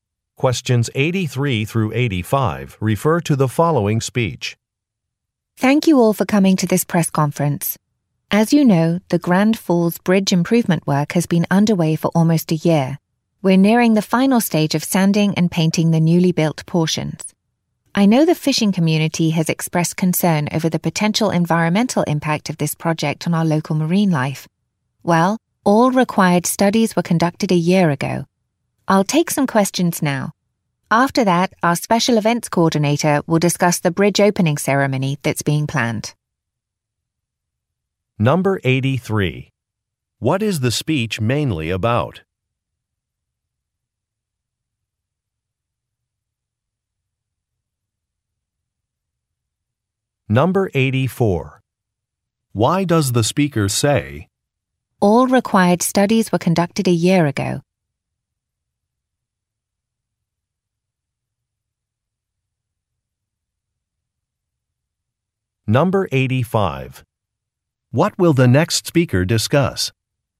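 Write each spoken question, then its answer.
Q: What is the speech mainly about?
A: The Grand Falls Bridge improvement project.

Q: What will the next speaker discuss?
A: The bridge opening ceremony.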